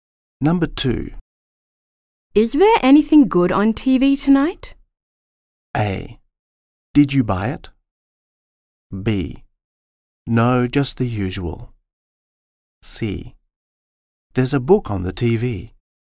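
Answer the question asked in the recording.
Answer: B: No, just the usual.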